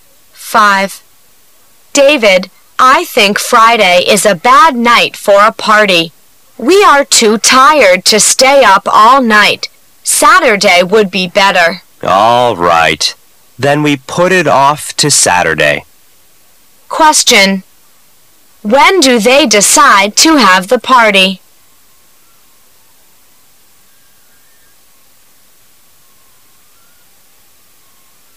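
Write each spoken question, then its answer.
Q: When do they decide to have the party?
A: Saturday

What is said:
[解析] W: David, I think Friday is a bad night for a party; we are too tired to stay up all night. Saturday would be better. M: All right. Then we put it off to Saturday. Q: When do they decide to have the party?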